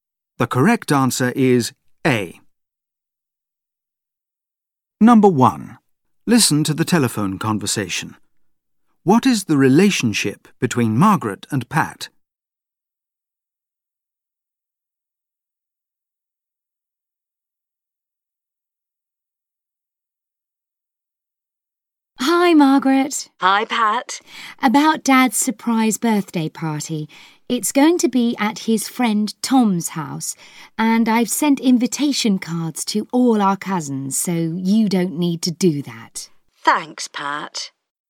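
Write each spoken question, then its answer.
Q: What is the relationship between Margaret and Pat?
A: They are siblings (brother and sister)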